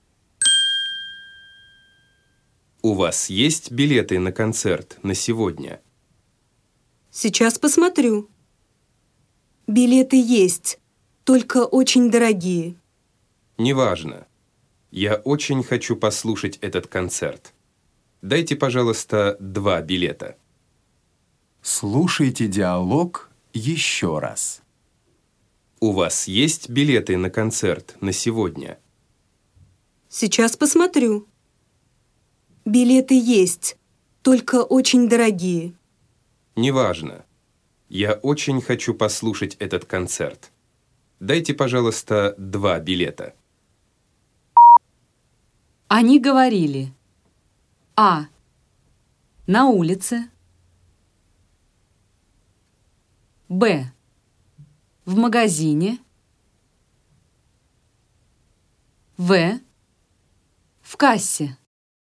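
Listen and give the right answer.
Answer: В: В кассе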